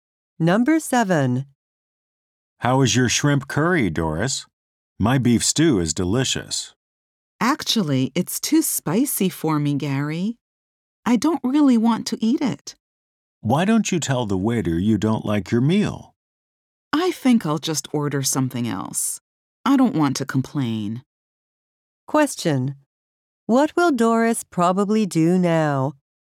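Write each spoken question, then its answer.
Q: What will Doris probably do now?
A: Order something else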